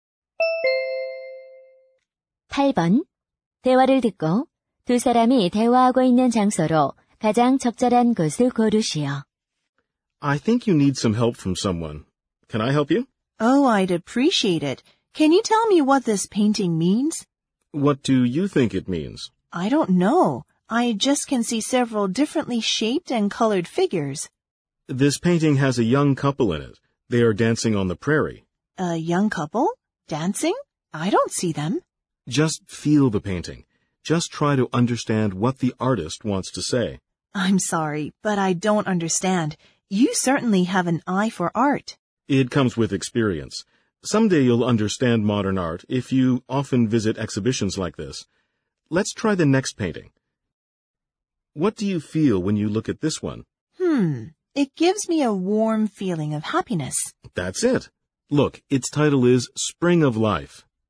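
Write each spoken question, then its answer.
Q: 대화를 듣고 두 사람이 대화하고 있는 장소로 가장 적절한 곳을 고르시오.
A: 미술관(전시회)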